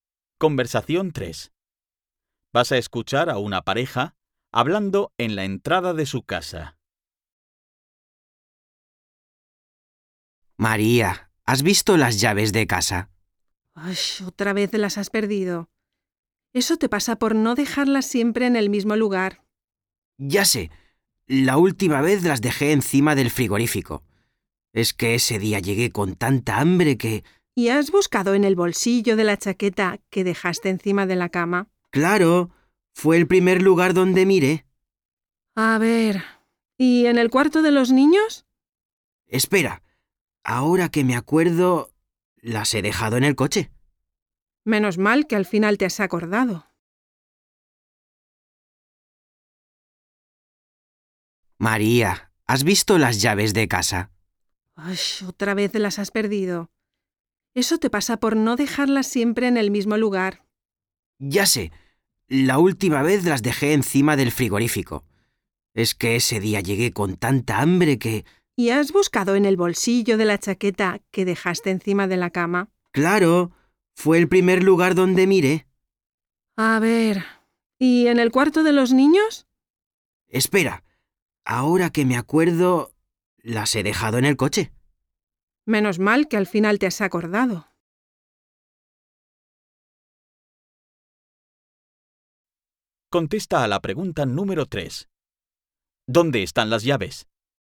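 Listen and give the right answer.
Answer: En el coche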